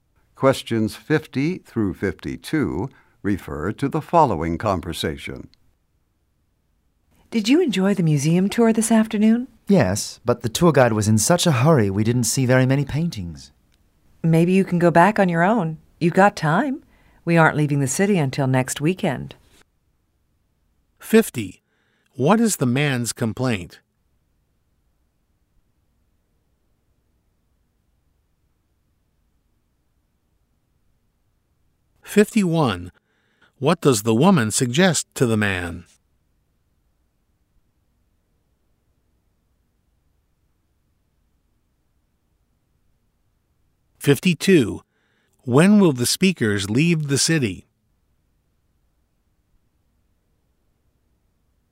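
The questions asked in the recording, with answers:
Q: What is the man's complaint?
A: The tour guide hurried, so he didn't see many paintings

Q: What does the woman suggest to the man?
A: Go back to the museum on his own

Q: When will the speakers leave the city?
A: Next weekend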